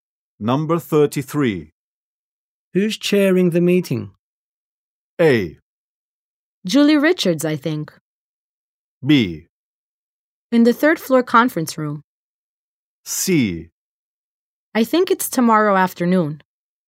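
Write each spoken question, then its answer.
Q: Who's chairing the meeting?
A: A: Julie Richards, I think.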